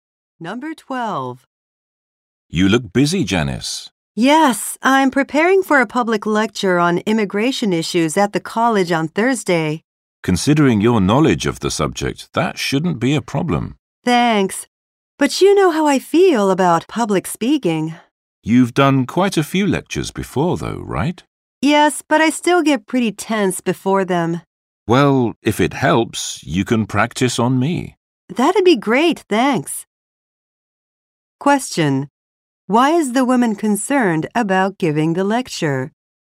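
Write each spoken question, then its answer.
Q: Why is the woman concerned about giving the lecture?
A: She gets nervous speaking in public.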